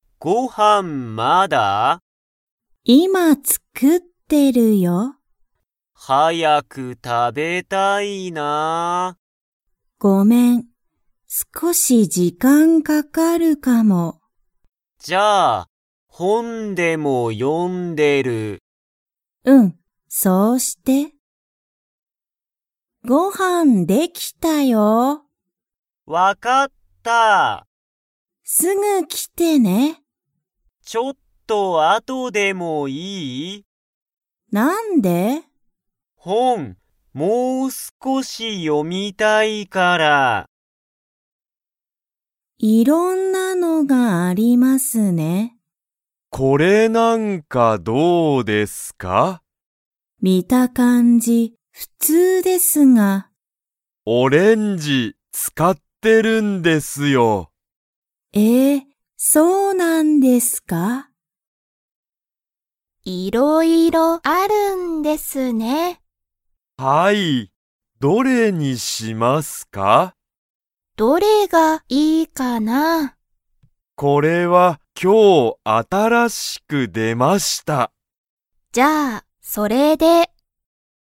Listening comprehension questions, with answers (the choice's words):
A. はい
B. いいえ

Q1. お母(かあ)さんは今(いま)、ご飯(はん)を作(つく)っていますか?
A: はい

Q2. ユタカはすぐ来(き)ますか?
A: いいえ

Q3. 見(み)た感(かん)じは____。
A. きれいだ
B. 普通(ふつう)だ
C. はやい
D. 新(あたら)しい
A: 普通(ふつう)だ

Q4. これは、今日(きょう)新(あたら)しく____。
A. 出(で)た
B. 見(み)た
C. 読(よ)んだ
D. 使つかった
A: 出(で)た

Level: Level 1